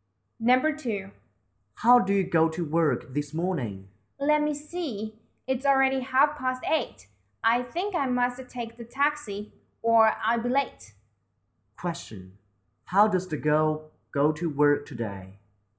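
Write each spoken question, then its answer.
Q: How does the girl go to work today?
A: By taxi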